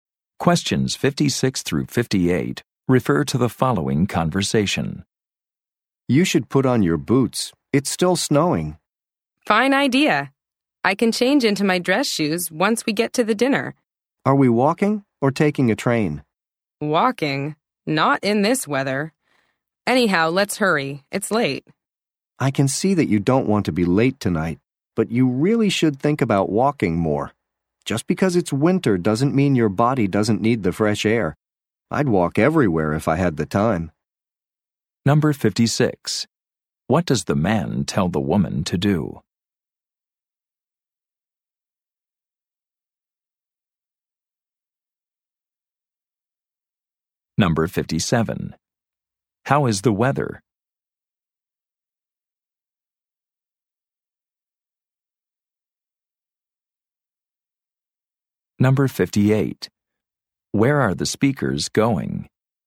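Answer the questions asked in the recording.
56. Put on her boots
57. It is snowing
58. To a dinner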